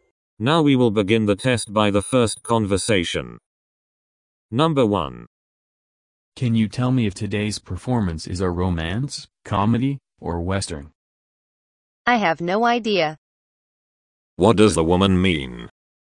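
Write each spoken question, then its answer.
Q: What does the woman mean?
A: She doesn't know what kind of performance it is.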